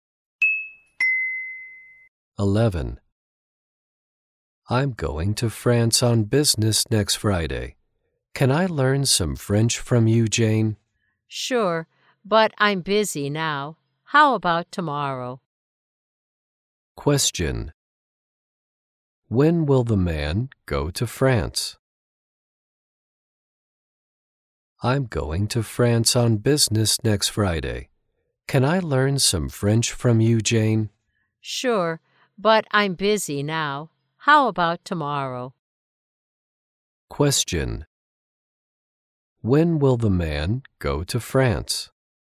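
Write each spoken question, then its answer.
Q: When will the man go to France?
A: Next Friday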